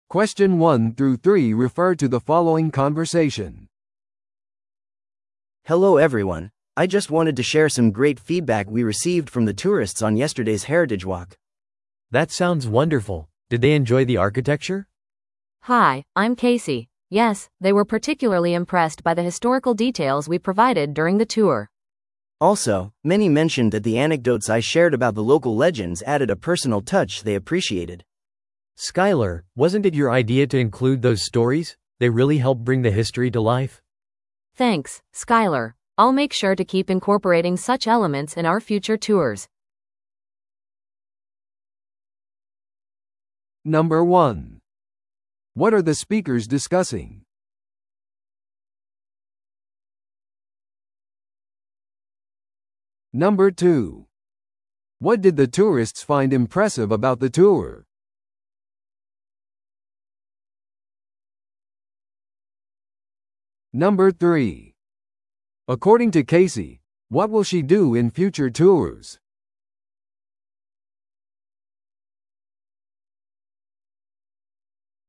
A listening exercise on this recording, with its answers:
Listen to the audio below and answer the questions.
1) What are the speakers discussing?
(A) 散策の新しいルートを選ぶこと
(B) 歴史散策のフィードバック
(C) 新しいツアーガイドのトレーニング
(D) ツアー中に遭遇した問題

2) What did the tourists find impressive about the tour?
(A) ツアーの手頃な価格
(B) 提供された歴史的な詳細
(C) 豪華な宿泊施設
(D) 提供される言語の多様性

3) According to Casey, what will she do in future tours?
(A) グループごとの観光客数を減らす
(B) 地元の伝説をさらに取り入れる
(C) パーソナライズされたツアーの料金を高くする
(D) 追加の言語でツアーを提供する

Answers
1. (B) 歴史散策のフィードバック
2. (B) 提供された歴史的な詳細
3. (B) 地元の伝説をさらに取り入れる

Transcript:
A: Hello everyone, I just wanted to share some great feedback we received from the tourists on yesterday's heritage walk.
B: That sounds wonderful! Did they enjoy the architecture?
C: Hi, I'm Casey. Yes, they were particularly impressed by the historical details we provided during the tour.
A: Also, many mentioned that the anecdotes I shared about the local legends added a personal touch they appreciated.
B: Skyler, wasn't it your idea to include those stories? They really help bring the history to life!
I'll make sure to keep incorporating such elements in our future tours.

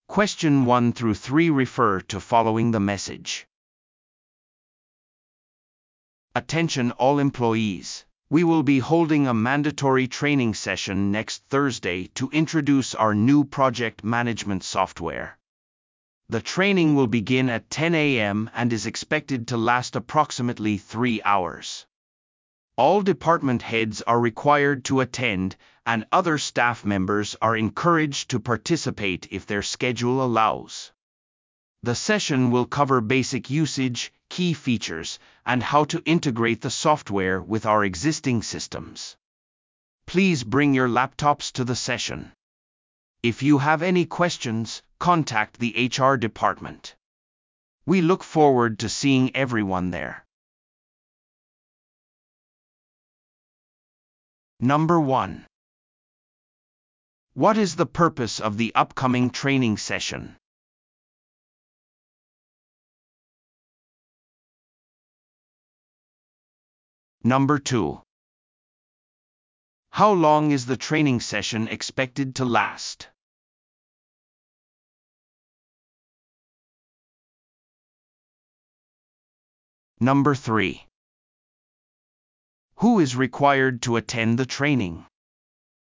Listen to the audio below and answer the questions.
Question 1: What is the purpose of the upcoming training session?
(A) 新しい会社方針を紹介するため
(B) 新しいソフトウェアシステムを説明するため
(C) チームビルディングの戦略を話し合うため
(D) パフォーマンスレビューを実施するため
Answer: (C) チームビルディングの戦略を話し合うため

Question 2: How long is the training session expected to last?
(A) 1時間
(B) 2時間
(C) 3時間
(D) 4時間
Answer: (B) 2時間

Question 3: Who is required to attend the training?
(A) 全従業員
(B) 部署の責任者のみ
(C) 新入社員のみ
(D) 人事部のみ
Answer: (A) 全従業員

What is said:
Attention all employees: We will be holding a mandatory training session next Thursday to introduce our new project management software. The training will begin at 10:00 AM and is expected to last approximately three hours. All department heads are required to attend, and other staff members are encouraged to participate if their schedule allows. The session will cover basic usage, key features, and how to integrate the software with our existing systems. Please bring your laptops to the session. If you have any questions, contact the HR department. We look forward to seeing everyone there.

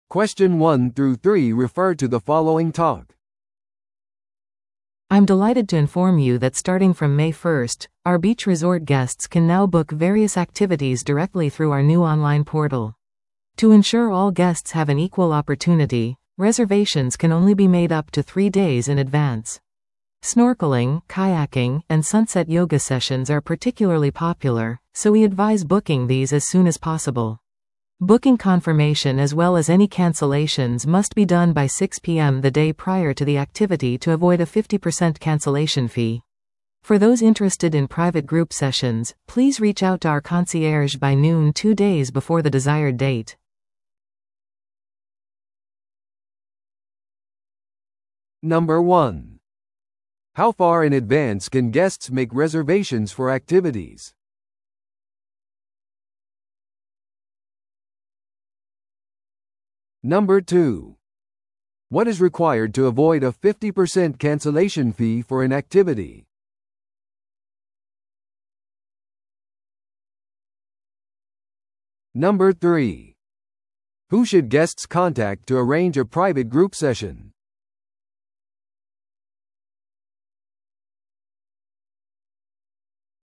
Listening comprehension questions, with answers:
Listen to the audio below and answer the questions.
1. How far in advance can guests make reservations for activities?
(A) アクティビティの当日までいつでも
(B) 1週間前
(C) 3日前まで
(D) アクティビティの同日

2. What is required to avoid a 50% cancellation fee for an activity?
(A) 状況にかかわらずアクティビティに参加する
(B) アクティビティの1週間前にキャンセルする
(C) アクティビティ前日の6pmまでにキャンセルする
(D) リゾートの受付でチェックインする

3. Who should guests contact to arrange a private group session?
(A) アクティビティのインストラクター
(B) リゾートのマネージャー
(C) オンラインポータルのヘルプデスク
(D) コンシェルジュ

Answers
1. (C) 3日前まで
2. (C) アクティビティ前日の6pmまでにキャンセルする
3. (D) コンシェルジュ

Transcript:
I'm delighted to inform you that starting from May 1st, our beach resort guests can now book various activities directly through our new online portal. To ensure all guests have an equal opportunity, reservations can only be made up to three days in advance. Snorkeling, kayaking, and sunset yoga sessions are particularly popular, so we advise booking these as soon as possible. Booking confirmation as well as any cancellations must be done by 6pm the day prior to the activity to avoid a 50% cancellation fee. For those interested in private group sessions, please reach out to our concierge by noon two days before the desired date.

